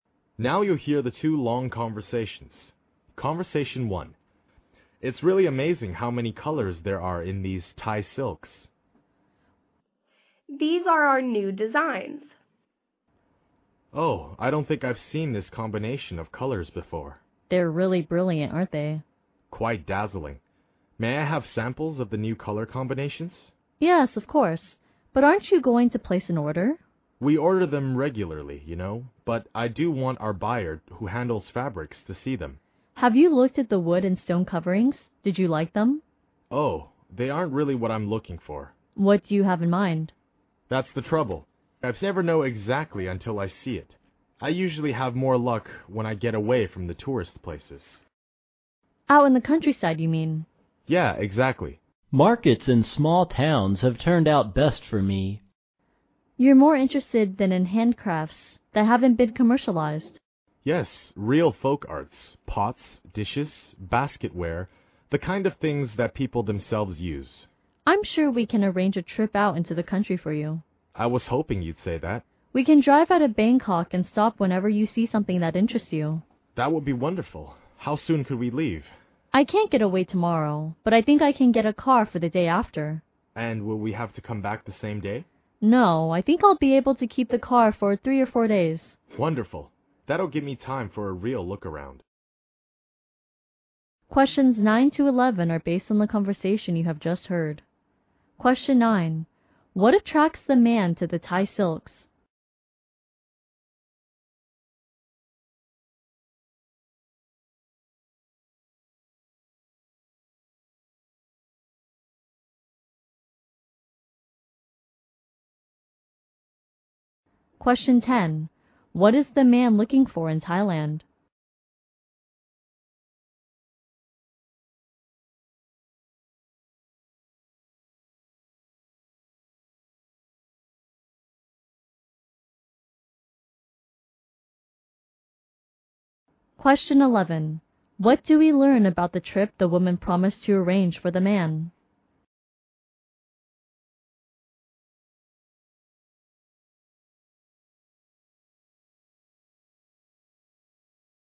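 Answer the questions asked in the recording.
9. Their brilliant new color combinations.
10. Non-commercialized folk handcrafts.
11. They will drive into the countryside the day after tomorrow for 3 or 4 days.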